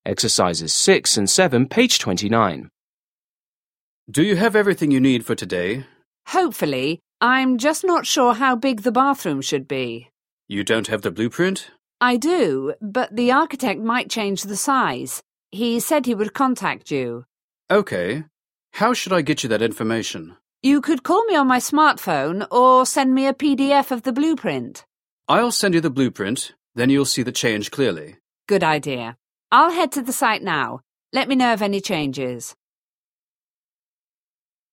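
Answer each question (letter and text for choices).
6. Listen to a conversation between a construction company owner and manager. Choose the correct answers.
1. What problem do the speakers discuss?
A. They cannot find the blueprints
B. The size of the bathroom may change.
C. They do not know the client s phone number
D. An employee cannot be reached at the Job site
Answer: B. The size of the bathroom may change.

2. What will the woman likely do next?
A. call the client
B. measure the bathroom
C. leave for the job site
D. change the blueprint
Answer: C. leave for the job site

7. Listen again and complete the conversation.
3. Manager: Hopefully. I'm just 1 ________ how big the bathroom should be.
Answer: not sure

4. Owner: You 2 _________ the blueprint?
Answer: don't have

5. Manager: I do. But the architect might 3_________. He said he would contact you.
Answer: change the size

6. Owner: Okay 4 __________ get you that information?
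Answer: How should I

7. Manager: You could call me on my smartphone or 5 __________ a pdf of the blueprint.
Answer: send me

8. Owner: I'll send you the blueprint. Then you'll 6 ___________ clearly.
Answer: see the change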